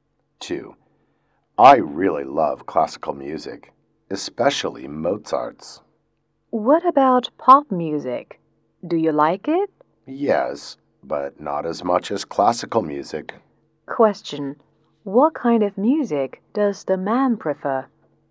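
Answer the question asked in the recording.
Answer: Classical music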